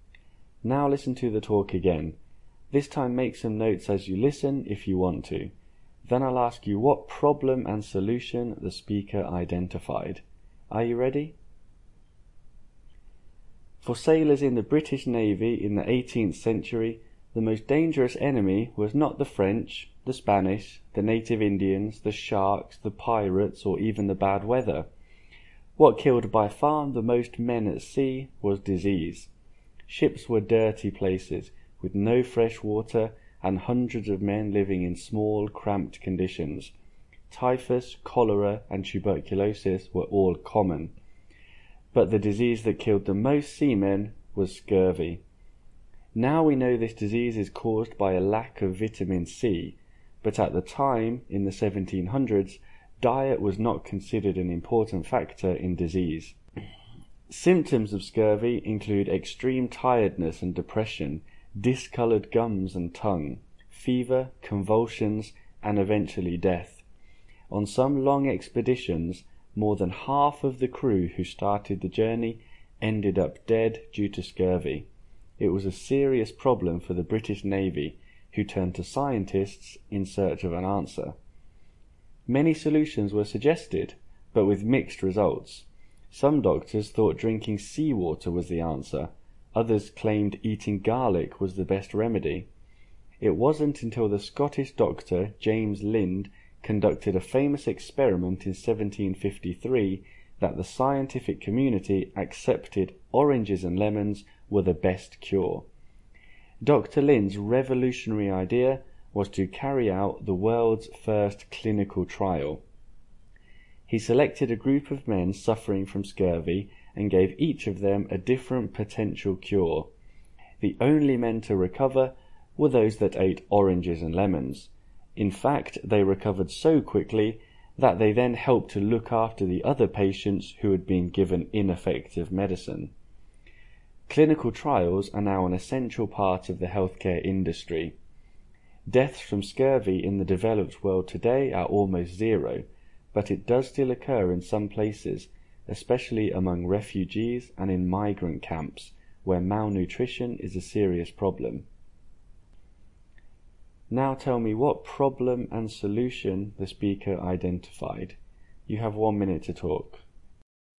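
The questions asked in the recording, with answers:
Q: Now tell me what problem and solution the speaker identified.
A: Problem: scurvy (lack of vitamin C) killed many sailors; solution: James Lind's clinical trial showed that oranges and lemons cure it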